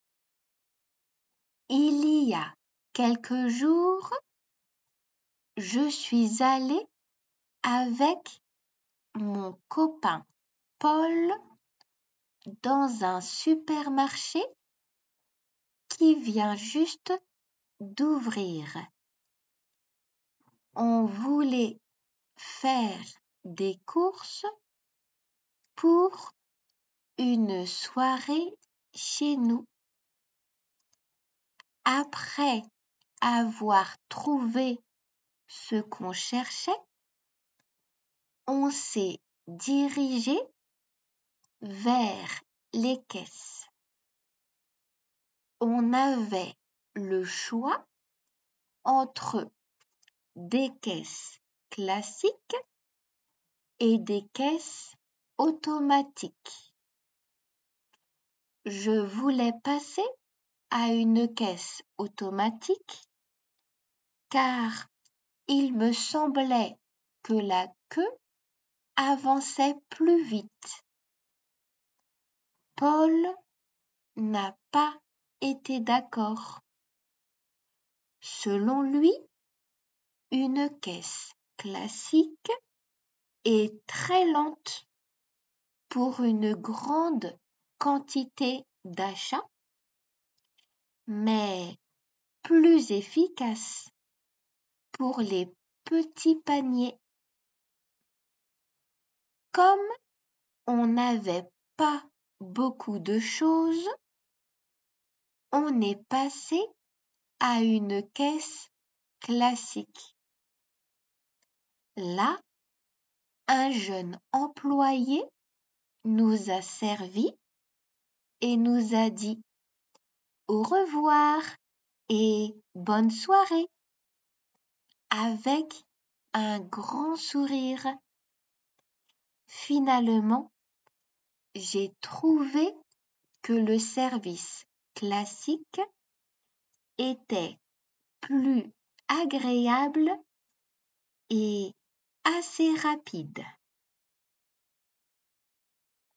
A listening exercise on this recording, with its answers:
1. Claire et Paul sont allés dans un nouveau supermarché.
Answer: 1

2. Claire et son copain sont allés faire des courses pour quelques jours.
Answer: ⓶

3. Claire et Paul ont trouvé les articles qu'il leur fallait.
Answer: 1

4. Dans le supermarché, Claire a remarqué deux types de caisse.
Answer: 1

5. Claire avait l'impression que la queue des caisses automatiques avançait moins vite.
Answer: ⓶

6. Paul préfère les caisses automatiques.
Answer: ⓶

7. Paul pense que les caisses classiques sont peu efficaces pour une grande quantité d'achats.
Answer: 1

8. Claire et son copain sont passés à la caisse séparément.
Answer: ⓶

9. A la caisse, un jeune homme a servi Claire et Paul en souriant.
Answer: 1

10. Claire n'a pas trouvé la caisse classique agréable.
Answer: ⓶

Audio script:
Il y a quelques jours, je suis allée avec mon copain Paul dans un supermarché qui vient juste d'ouvrir.
On voulait faire des courses pour une soirée chez nous. Après avoir trouvé ce qu'on cherchait, on s'est dirigés vers les caisses.
On avait le choix entre des caisses classiques et des caisses automatiques.
Je voulais passer à une caisse automatique, car il me semblait que la queue avançait plus vite.
Paul n'a pas été d'accord.
Selon lui, une caisse classique est très lente pour une grande quantité d'achats, mais plus efficace pour les petits paniers.
Comme on n'avait pas beaucoup de choses, on est passés à une caisse classique.
Là, un jeune employé nous a servis et nous a dit "au revoir et bonne soirée" avec un grand sourire.
Finalement, j'ai trouvé que le service classique était plus agréable et assez rapide.

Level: 2級